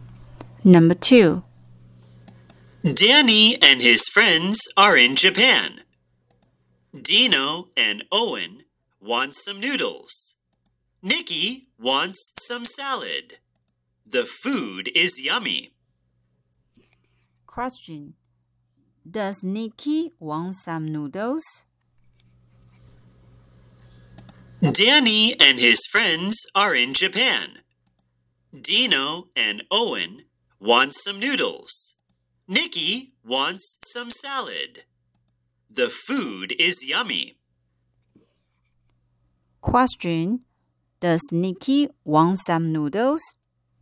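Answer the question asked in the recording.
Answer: No, she doesn't. She wants some salad.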